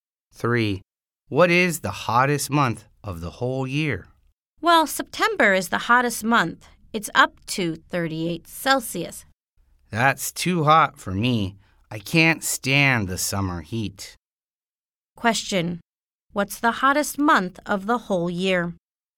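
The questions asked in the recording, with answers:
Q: What's the hottest month of the whole year?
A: September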